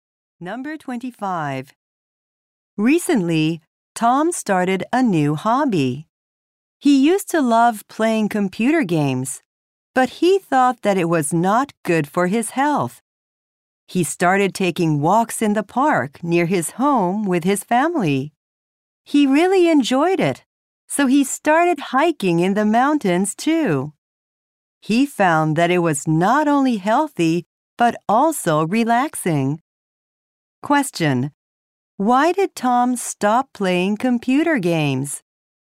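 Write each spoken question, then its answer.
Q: Why did Tom stop playing computer games?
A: He thought it was not good for his health.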